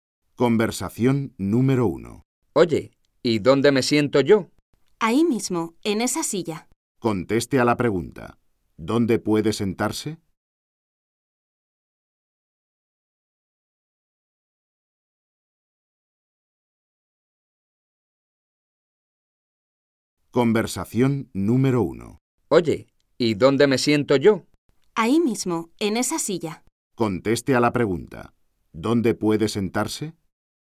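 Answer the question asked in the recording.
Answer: En una silla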